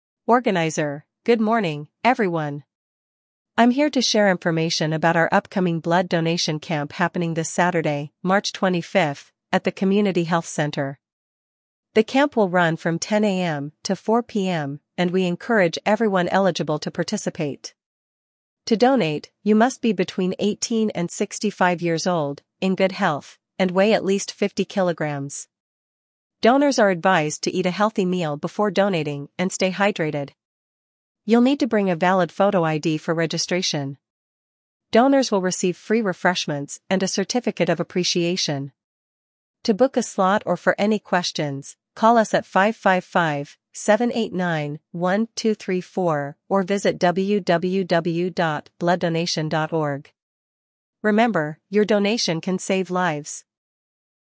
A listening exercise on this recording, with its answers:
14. When is the blood donation camp scheduled?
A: Saturday, March 25th

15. Where will the camp take place?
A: Community Health Center

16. Who is eligible to donate blood?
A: 18–65 years old, 50 kg minimum weight

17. What should donors bring for registration?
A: Photo ID

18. What will participants receive after donating?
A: Free refreshments and certificate

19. How can people book a donation slot?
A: Call 555-789-1234 or visit the website

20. Why does the speaker encourage participation?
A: Saving lives

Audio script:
Organizer: Good morning, everyone! I'm here to share information about our upcoming blood donation camp happening this Saturday, March 25th, at the Community Health Center. The camp will run from 10 AM to 4 PM, and we encourage everyone eligible to participate.
To donate, you must be between 18 and 65 years old, in good health, and weigh at least 50 kilograms. Donors are advised to eat a healthy meal before donating and stay hydrated. You'll need to bring a valid photo ID for registration.
Donors will receive free refreshments and a certificate of appreciation. To book a slot or for any questions, call us at 555-789-1234 or visit www.blooddonation.org. Remember, your donation can save lives!